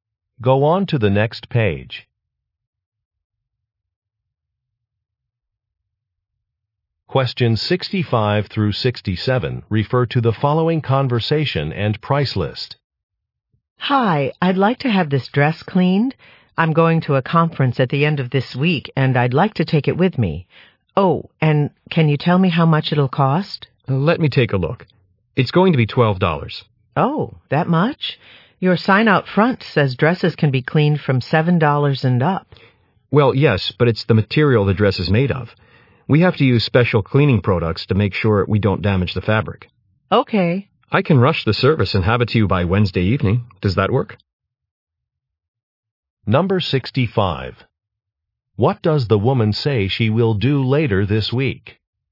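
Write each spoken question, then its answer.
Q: What does the woman say she will do later this week?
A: Go to a conference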